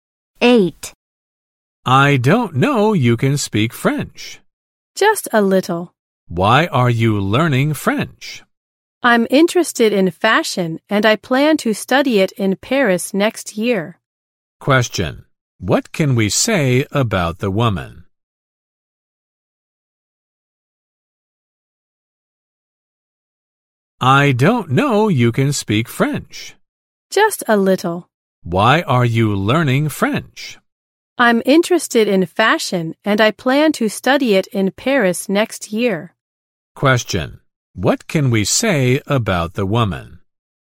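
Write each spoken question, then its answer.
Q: Question: What can we say about the woman?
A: She is interested in fashion and plans to study it in Paris.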